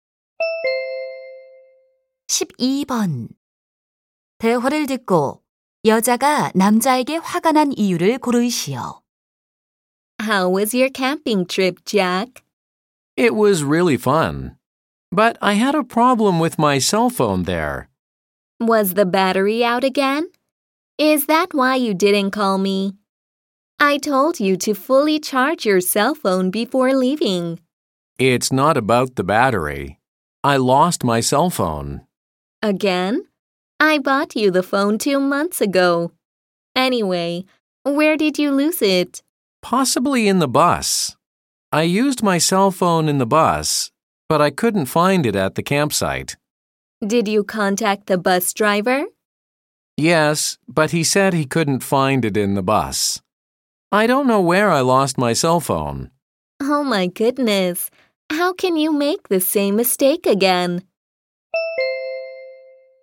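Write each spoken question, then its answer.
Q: 대화를 듣고 여자가 남자에게 화가 난 이유를 고르시오.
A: 남자가 또 휴대전화를 잃어버려서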